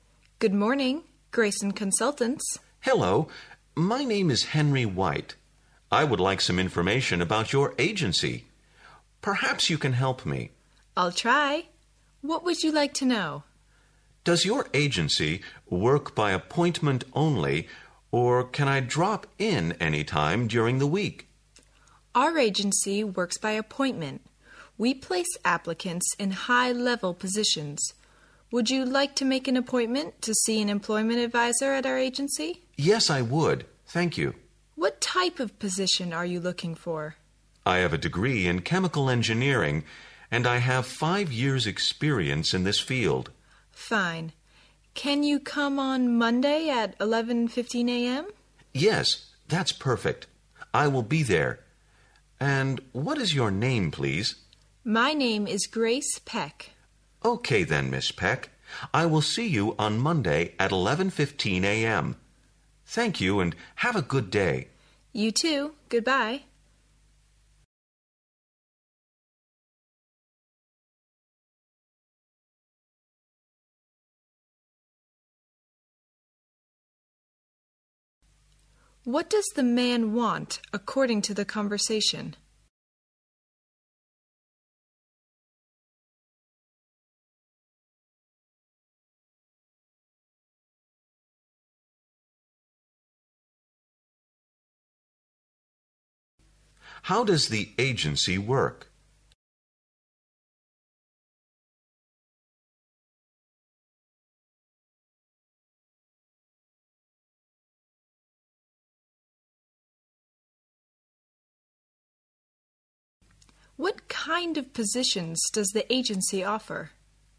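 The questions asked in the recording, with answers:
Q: What does the man want, according to the conversation?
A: Information about the agency and an appointment with an employment advisor

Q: How does the agency work?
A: By appointment only

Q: What kind of positions does the agency offer?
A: High-level positions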